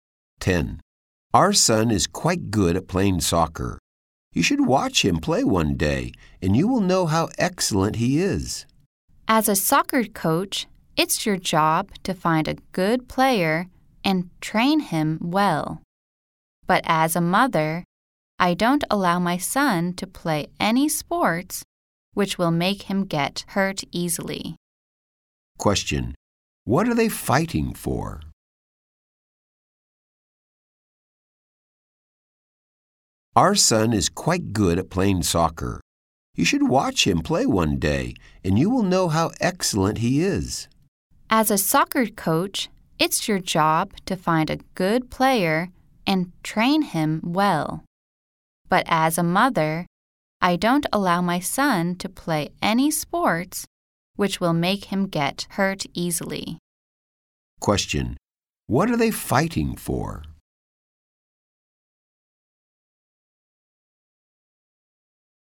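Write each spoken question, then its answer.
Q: What are they fighting for?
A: Whether their son should play soccer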